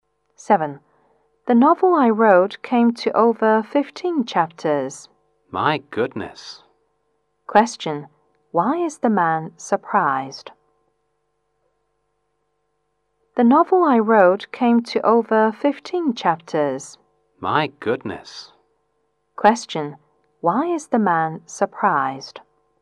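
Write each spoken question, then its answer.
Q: Why is the man surprised?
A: Because the woman's novel came to over 15 chapters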